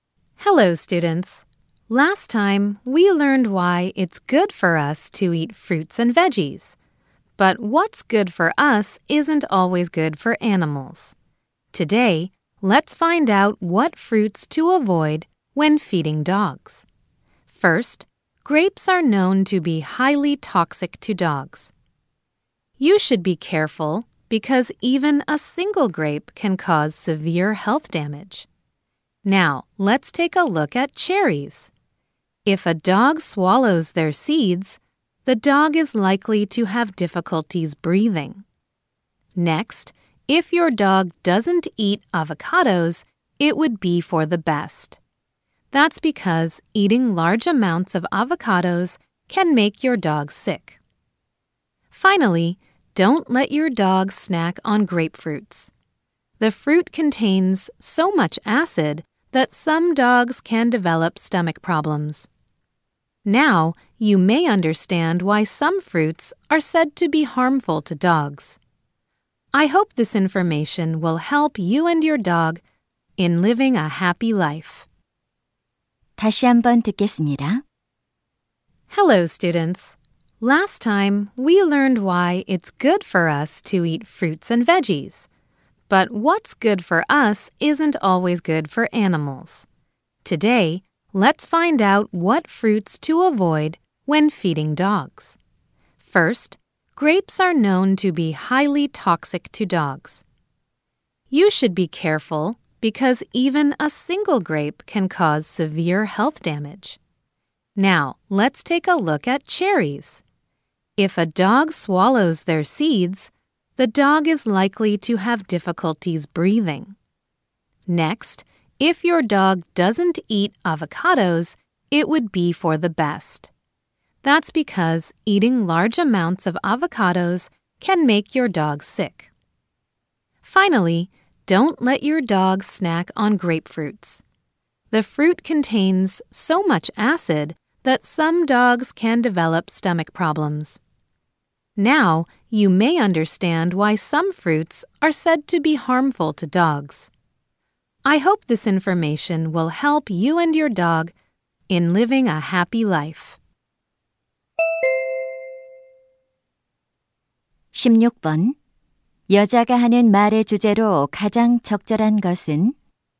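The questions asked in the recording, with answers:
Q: 여자가 하는 말의 주제로 가장 적절한 것은?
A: 개에게 해로운 과일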